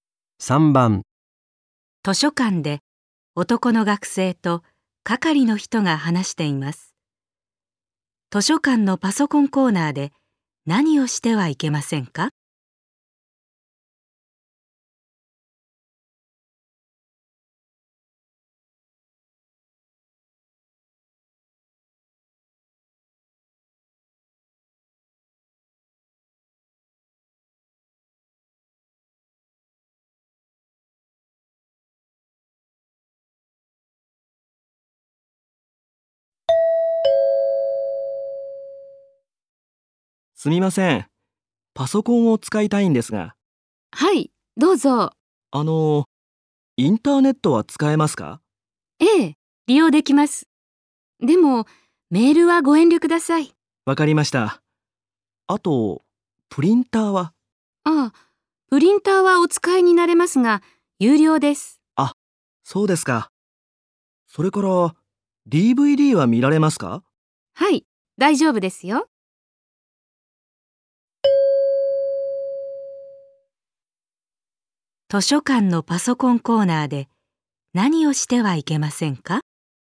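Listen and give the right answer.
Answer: メールをすること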